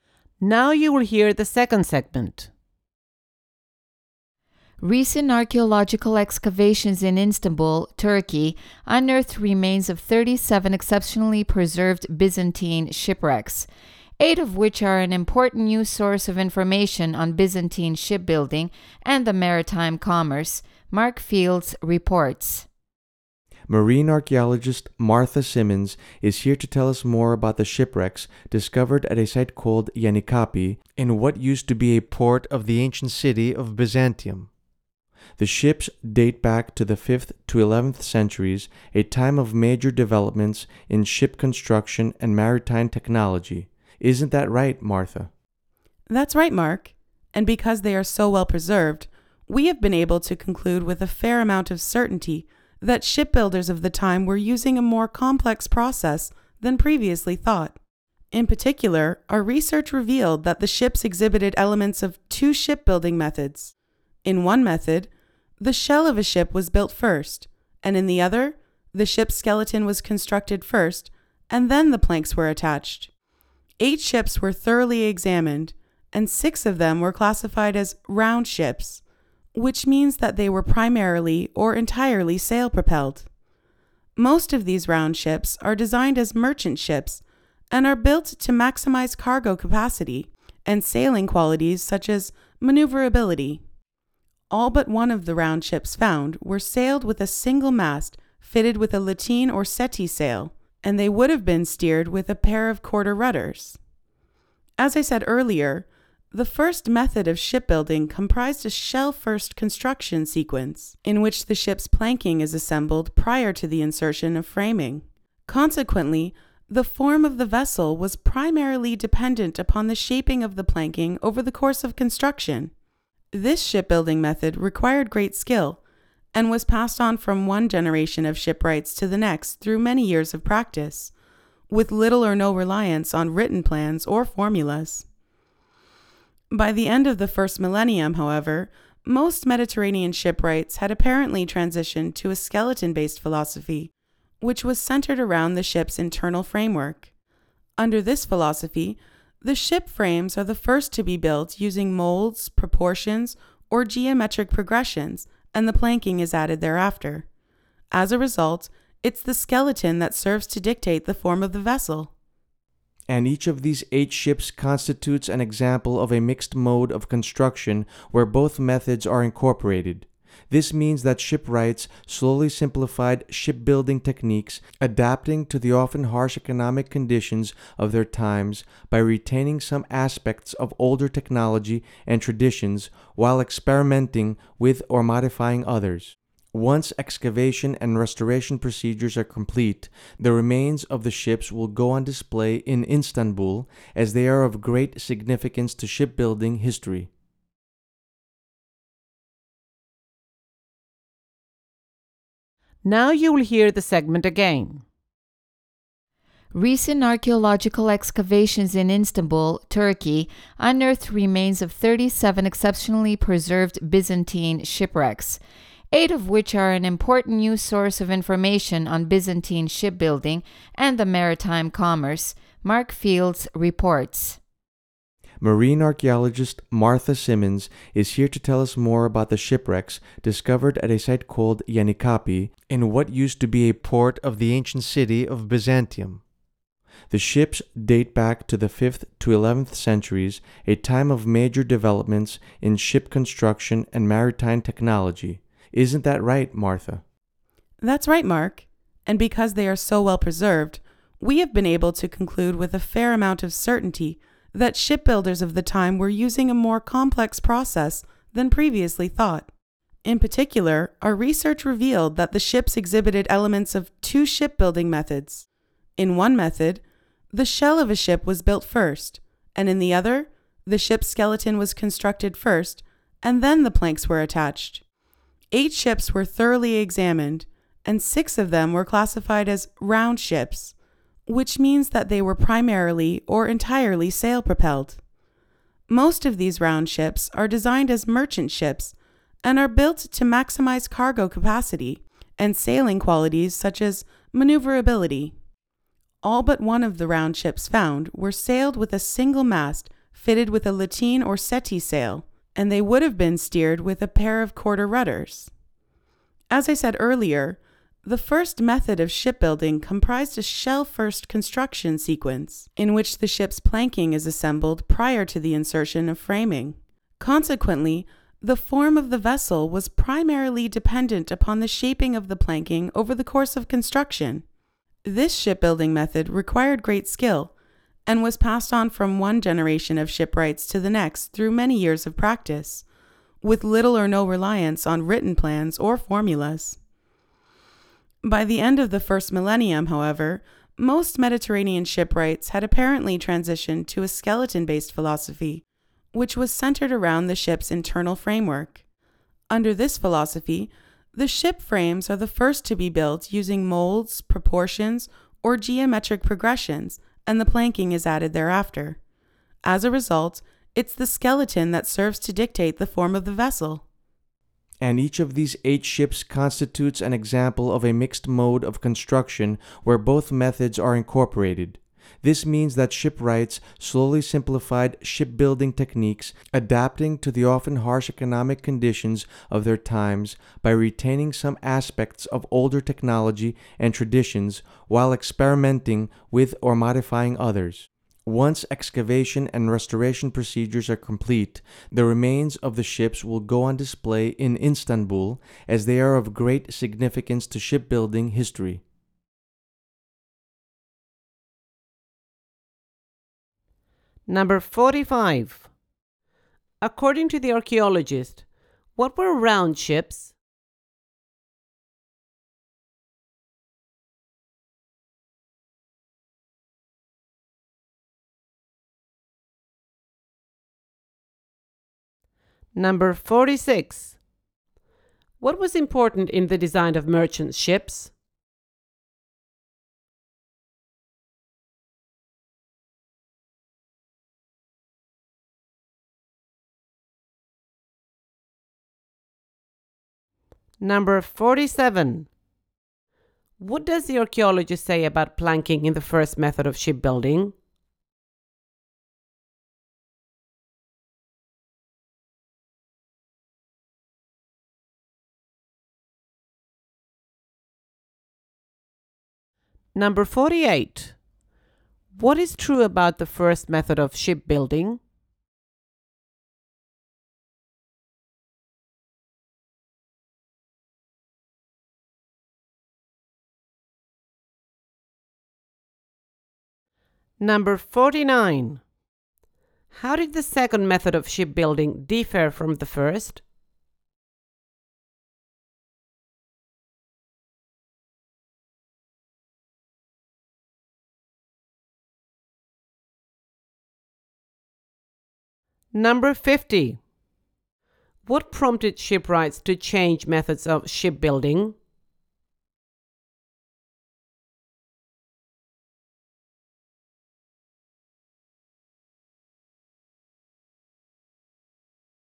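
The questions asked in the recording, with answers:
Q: According to the archaeologist, what were round ships?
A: Ships that were mainly or entirely sail-propelled

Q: What was important in the design of merchant ships?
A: Maximizing cargo capacity and sailing qualities such as maneuverability

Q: What does the archaeologist say about planking in the first method of shipbuilding?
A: It was assembled before the framing, and its shaping determined the vessel's form

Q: How did the second method of shipbuilding differ from the first?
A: The frames (skeleton) were built first and determined the form; planking was added afterward

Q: What prompted shipwrights to change methods of shipbuilding?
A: Harsh economic conditions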